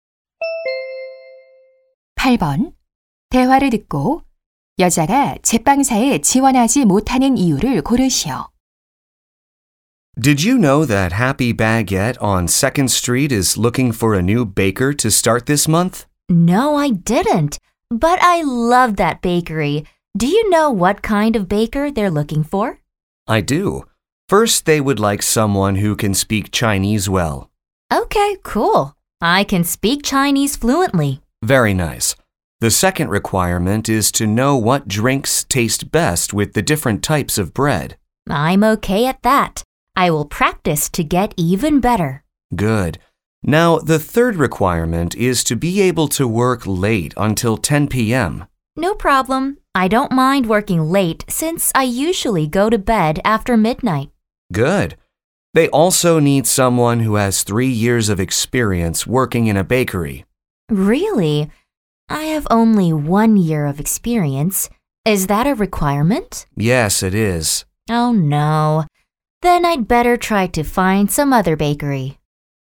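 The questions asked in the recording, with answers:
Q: 대화를 듣고 여자가 제빵사에 지원하지 못하는 이유를 고르시오.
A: 제빵 경력 3년이 부족해서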